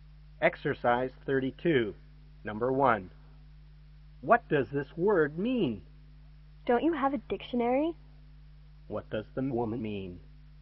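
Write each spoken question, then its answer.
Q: What does the woman mean?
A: The man should look the word up in a dictionary.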